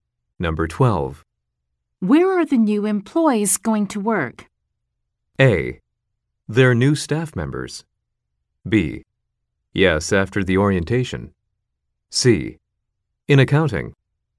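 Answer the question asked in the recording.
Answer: C: In accounting.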